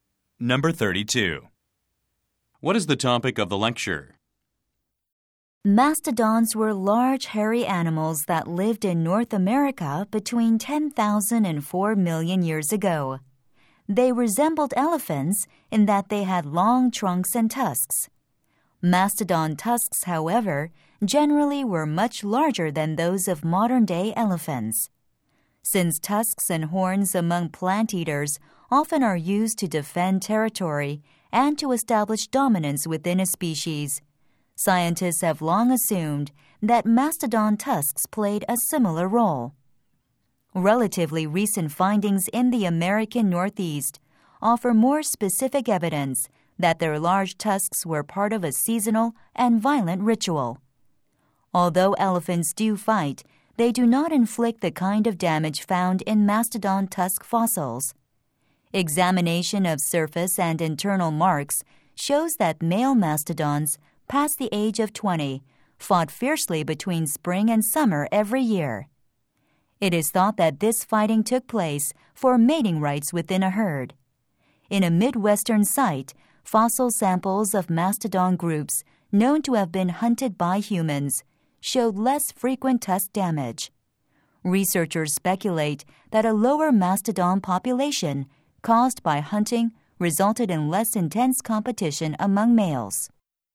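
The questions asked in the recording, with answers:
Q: What is the topic of the lecture?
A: Mastodons' large tusks were used in seasonal fights between males, probably for mating rights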